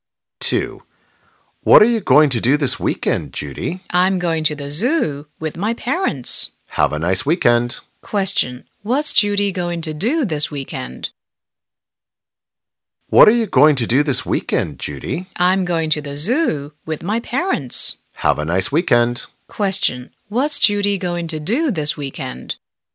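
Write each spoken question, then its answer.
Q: What's Judy going to do this weekend?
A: Go to the zoo with her parents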